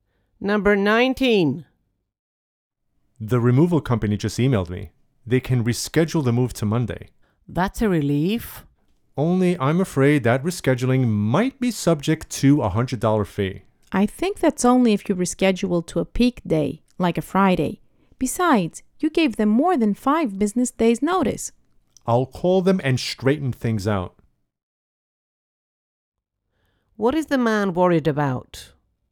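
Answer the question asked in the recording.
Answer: Being charged a $100 rescheduling fee.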